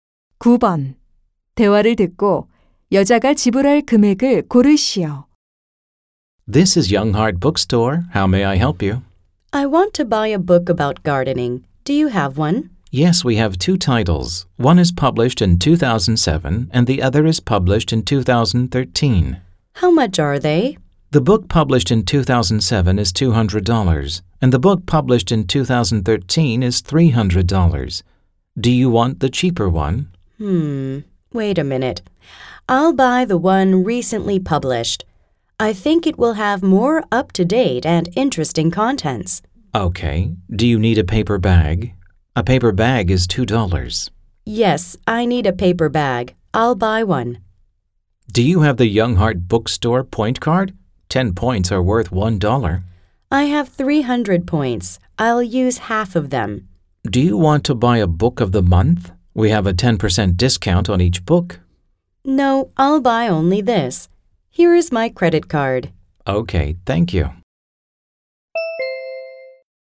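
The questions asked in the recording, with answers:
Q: 대화를 듣고 여자가 지불할 금액을 고르시오.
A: $287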